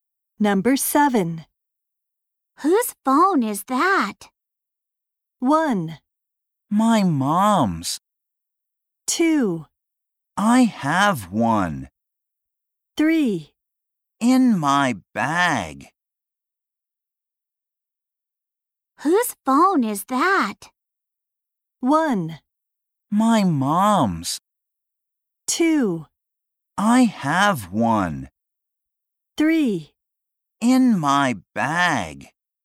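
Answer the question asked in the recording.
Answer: 1: My mom's.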